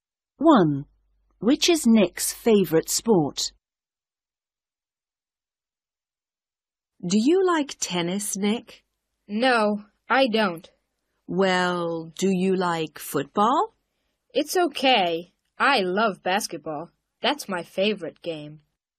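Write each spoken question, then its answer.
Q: Which is Nick's favourite sport?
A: basketball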